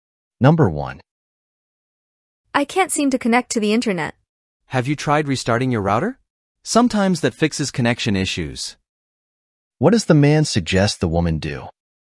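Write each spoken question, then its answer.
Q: What does the man suggest the woman do?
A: Restart her router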